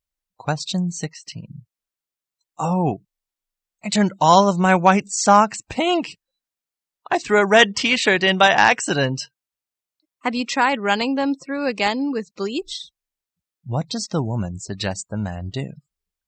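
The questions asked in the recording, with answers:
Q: What does the woman suggest the man do?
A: Wash the socks again with bleach.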